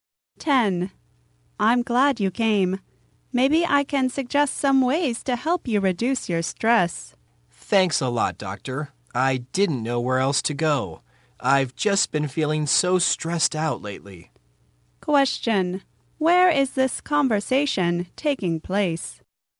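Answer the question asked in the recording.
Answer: At a doctor's office.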